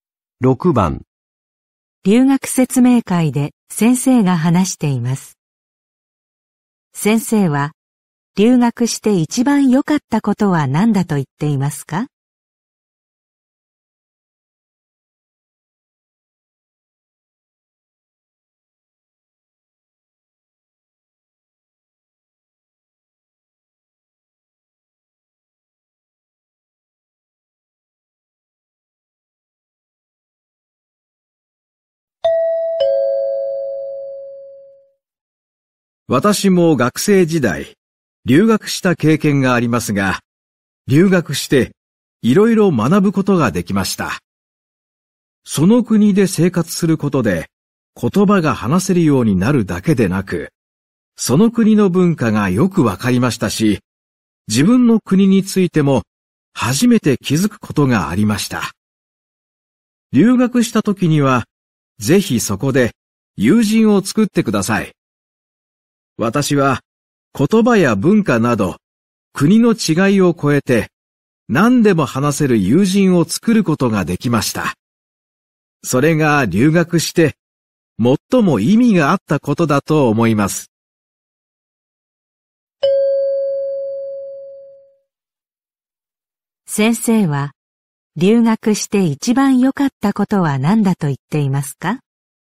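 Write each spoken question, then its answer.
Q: 先生は留学して一番良かったことは何だと言っていますか?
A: 何でも話せる友人を作れたこと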